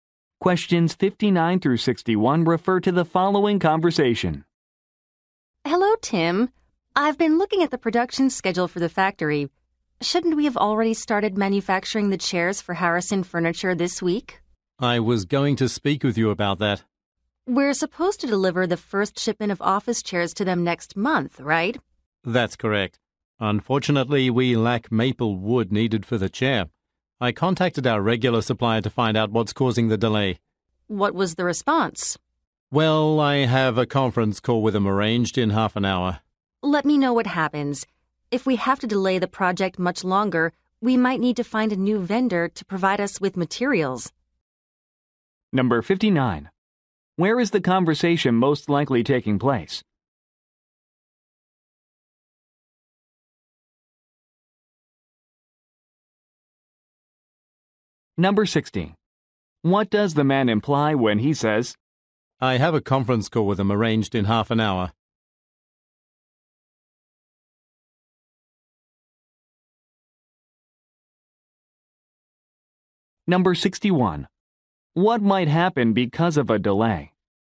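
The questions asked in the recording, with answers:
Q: Where is the conversation most likely taking place?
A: At a furniture factory

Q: I have a conference call with him arranged in half an hour.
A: He doesn't know the reason for the delay yet

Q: What might happen because of a delay?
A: They might find a new supplier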